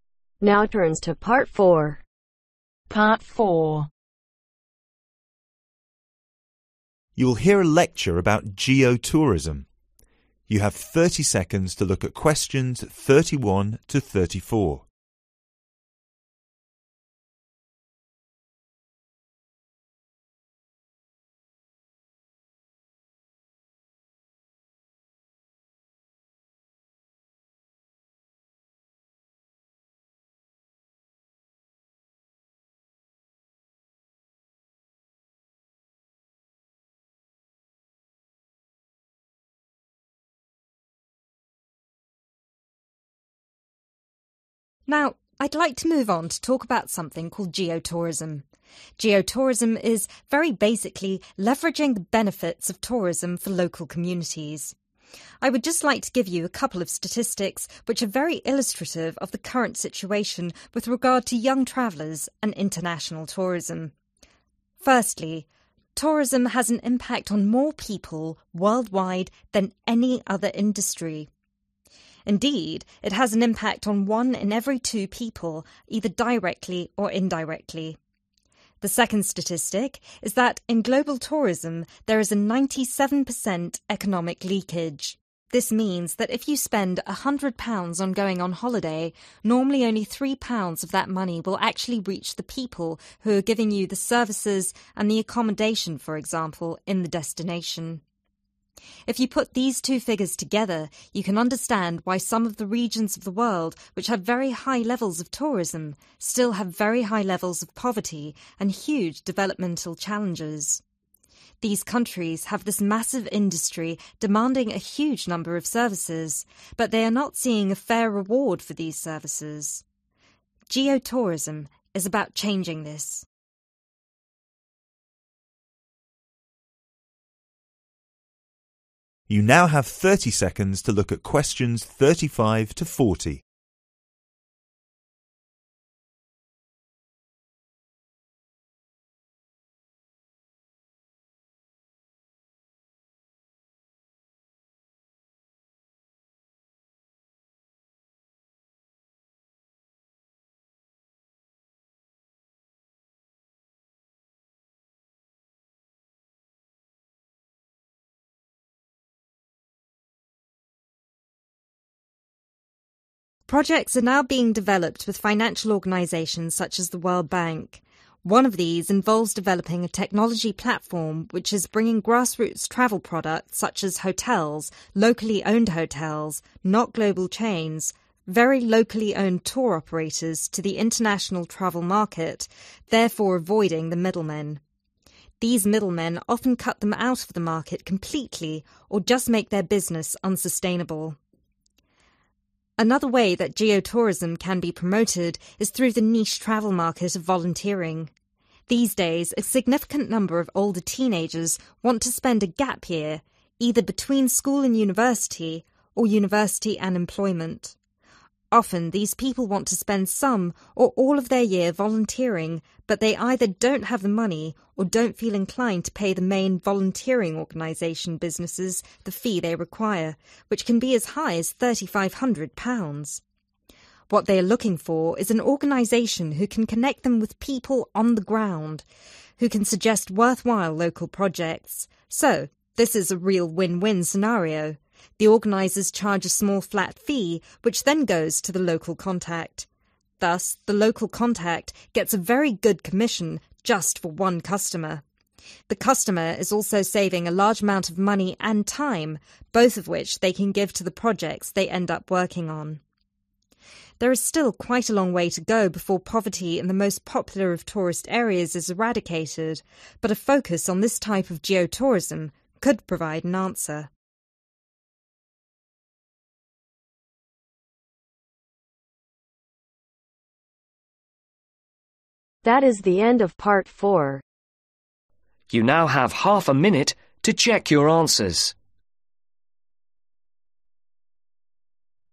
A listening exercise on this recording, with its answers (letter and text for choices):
Choose the correct answer A,B or C. Write your answers in boxes 31-34 on your answer sheet.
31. Compared to other industries, tourism has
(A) the most young customers.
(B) the biggest impact on people.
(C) only indirect impact.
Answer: (B) the biggest impact on people.

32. In global tourism there is a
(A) 97% economic leakage.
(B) a 9 in 10 chance of failure.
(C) about 9% economic failure.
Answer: (A) 97% economic leakage.

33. Some countries with high levels of tourism still have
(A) poor accommodation.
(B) great poverty.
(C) large national debt.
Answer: (B) great poverty.

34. Geo-tourism is all about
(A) reducing pollution from industry.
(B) increasing numbers of travellers.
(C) providing a fair reward for service.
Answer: (C) providing a fair reward for service.

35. Avoids 35 ....... men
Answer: Middle

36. Many teen schedule 36 ............ year between school university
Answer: Gap

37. Volunteering organizations charge up to £ 37 ........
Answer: £3500

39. Organizers would charge flat 39 ........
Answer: Fee

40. This would make for a good 40 ....... for each customer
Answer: Commission